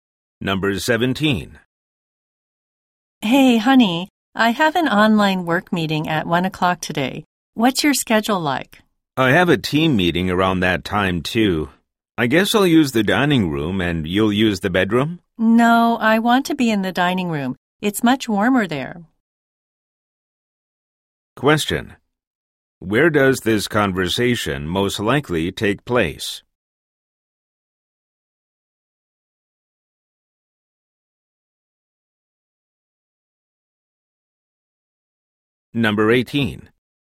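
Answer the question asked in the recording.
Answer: At their home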